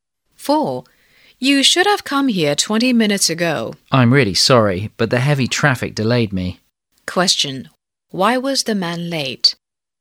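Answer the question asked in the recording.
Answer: Heavy traffic delayed him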